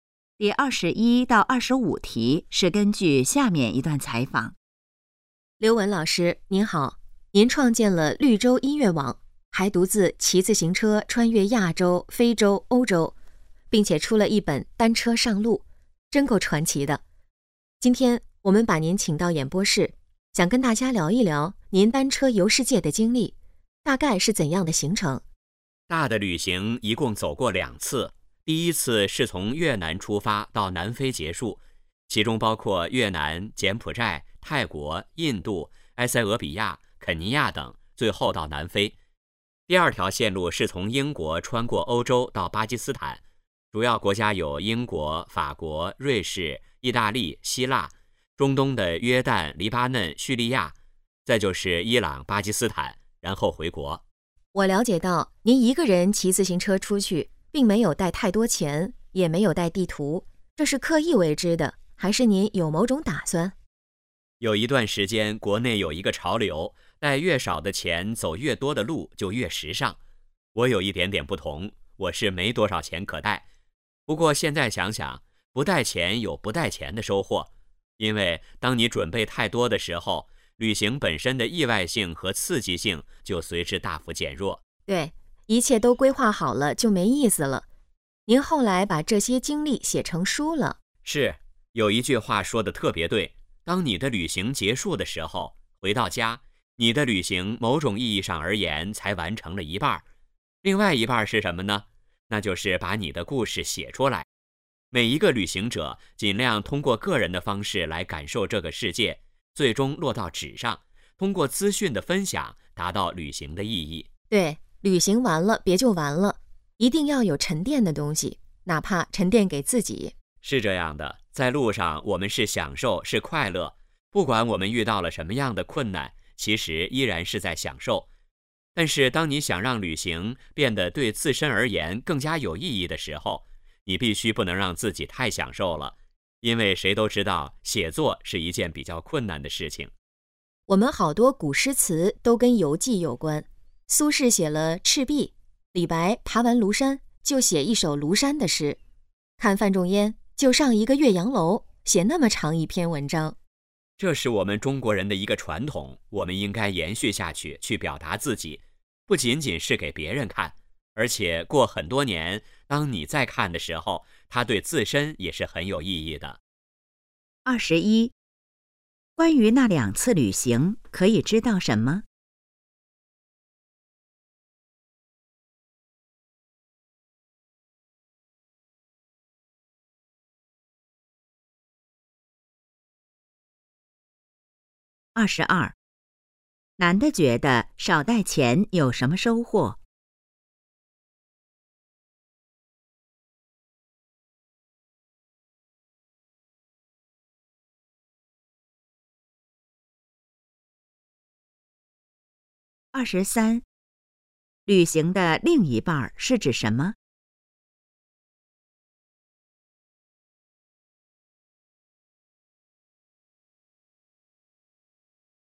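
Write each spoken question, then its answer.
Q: 男的觉得少带钱有什么收获?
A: 旅行的意外性和刺激性不会减弱

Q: 旅行的另一半是指什么?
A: 把旅行的故事写出来

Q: 男的怎样看待旅行的过程?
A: 不管遇到什么困难,都是享受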